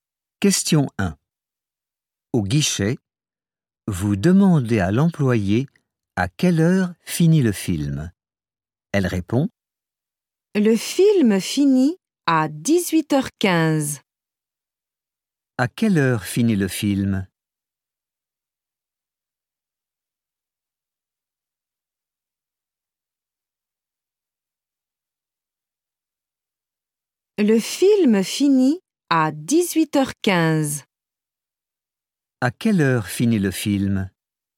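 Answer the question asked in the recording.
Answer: À 18h15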